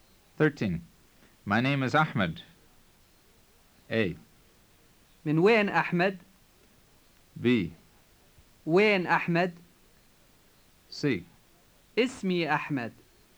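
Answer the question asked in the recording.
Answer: C: اسمي أحمد.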